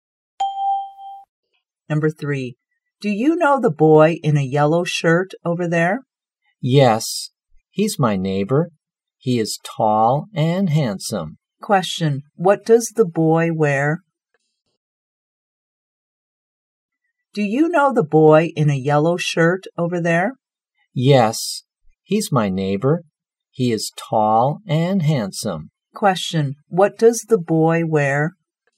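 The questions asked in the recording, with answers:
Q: Question, what does the boy wear?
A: A yellow shirt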